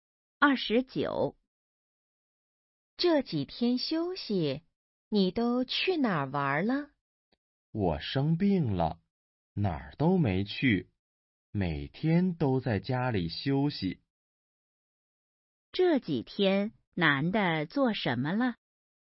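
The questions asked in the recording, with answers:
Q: 这几天男的做什么了?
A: 在家休息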